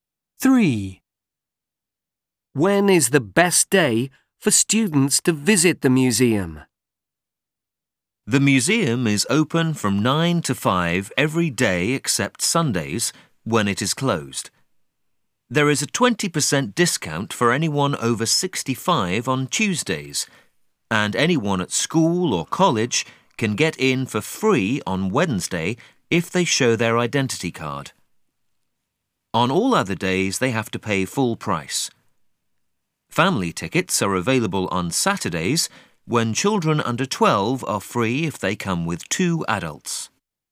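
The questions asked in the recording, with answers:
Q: When is the best day for students to visit the museum?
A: Wednesday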